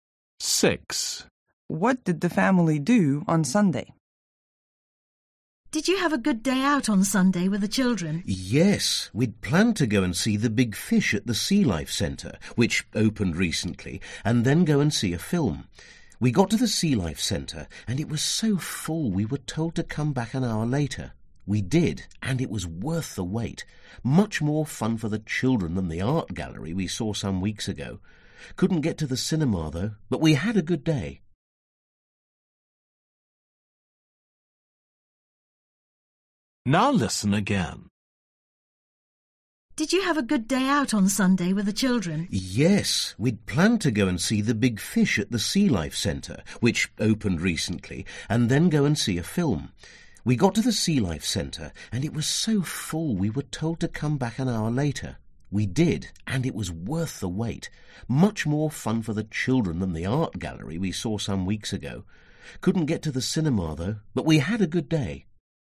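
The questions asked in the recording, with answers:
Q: What did the family do on Sunday?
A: went to the Sea Life Centre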